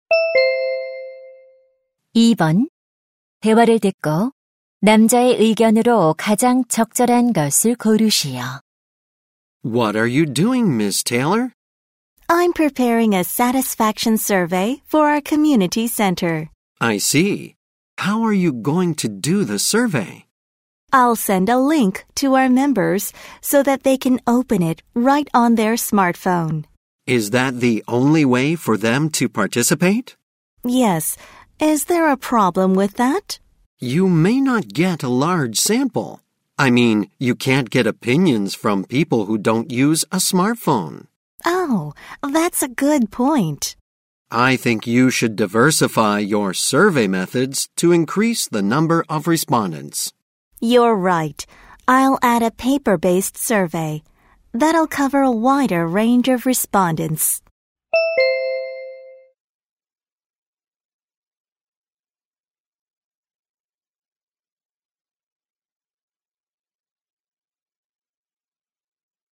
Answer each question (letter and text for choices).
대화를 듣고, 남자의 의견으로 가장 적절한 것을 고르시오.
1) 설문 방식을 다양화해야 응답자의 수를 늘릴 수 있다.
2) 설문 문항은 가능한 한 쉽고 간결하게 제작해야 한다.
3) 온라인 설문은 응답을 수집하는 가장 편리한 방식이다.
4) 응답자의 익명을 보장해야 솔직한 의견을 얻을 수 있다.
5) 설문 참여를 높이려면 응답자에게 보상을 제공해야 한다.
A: 1) 설문 방식을 다양화해야 응답자의 수를 늘릴 수 있다.

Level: 고3